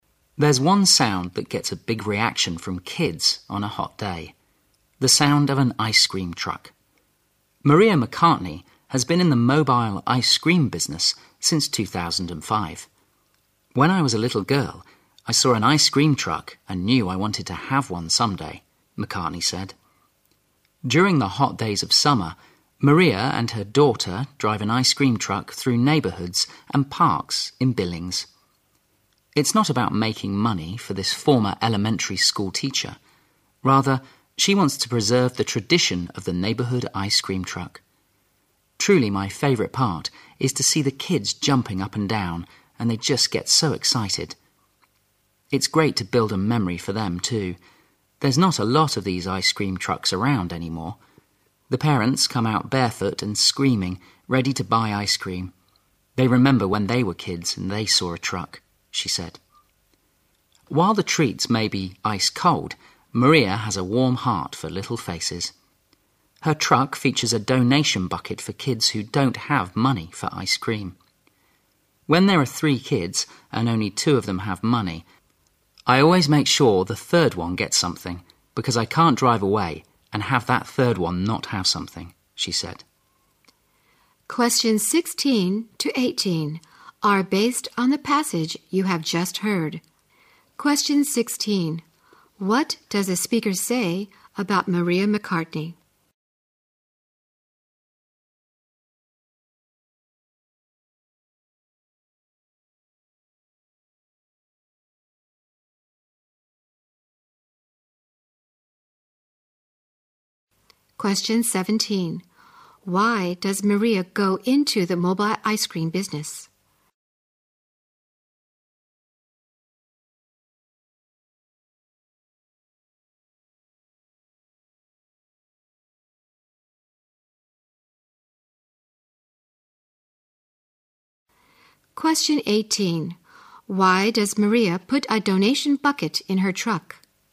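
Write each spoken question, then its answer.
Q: Why does Maria go into the mobile ice cream business?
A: To preserve the tradition of the neighbourhood ice cream truck.

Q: Why does Maria put a donation bucket in her truck?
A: So that kids without money can still get ice cream.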